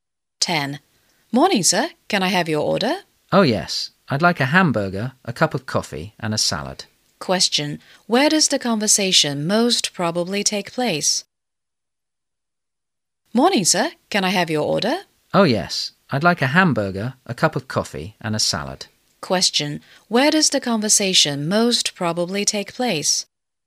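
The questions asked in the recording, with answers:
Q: Question, where does the conversation most probably take place?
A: In a restaurant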